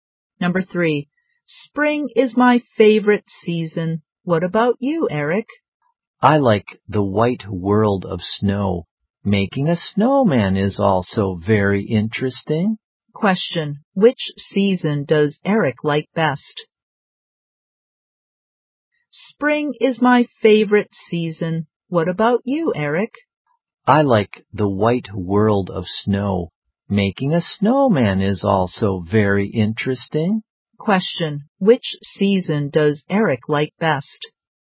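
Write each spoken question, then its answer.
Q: which season does Eric like best?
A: Winter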